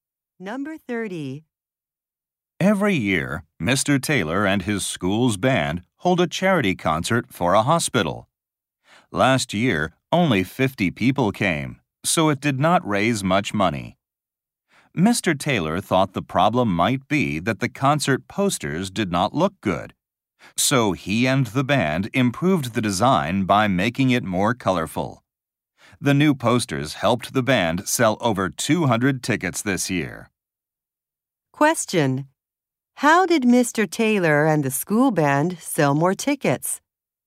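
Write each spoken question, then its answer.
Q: How did Mr. Taylor and the school band sell more tickets?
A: They made the posters more colorful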